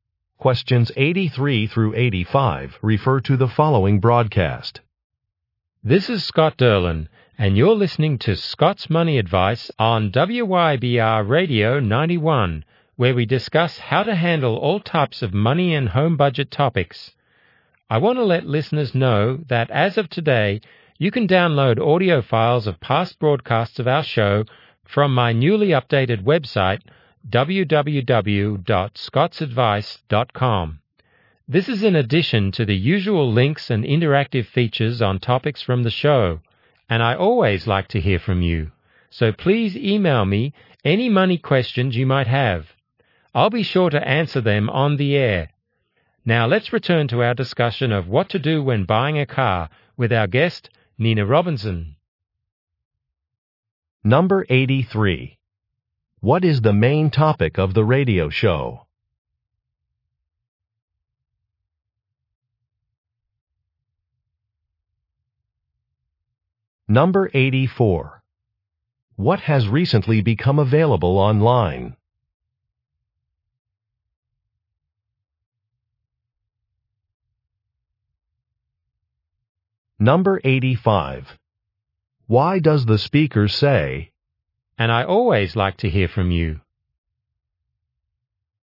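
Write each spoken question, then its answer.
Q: What is the main topic of the radio show?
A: Money and home budget advice.

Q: What has recently become available online?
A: Audio files of past broadcasts.

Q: "And I always like to hear from you"?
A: To encourage listeners to email money questions.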